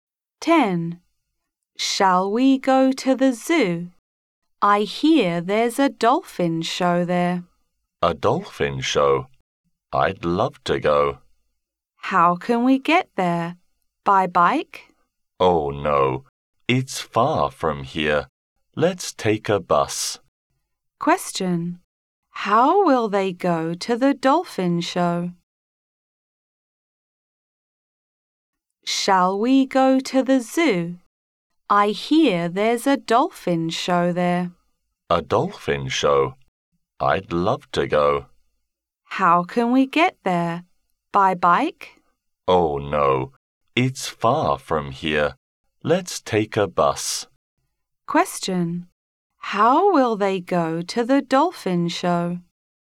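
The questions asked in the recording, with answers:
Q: How will they go to the dolphin show?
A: By bus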